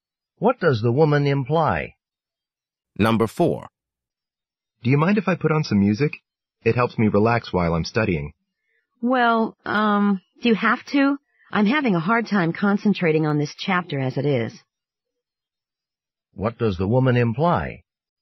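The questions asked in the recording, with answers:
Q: What does the woman imply?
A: She would prefer that the man not play music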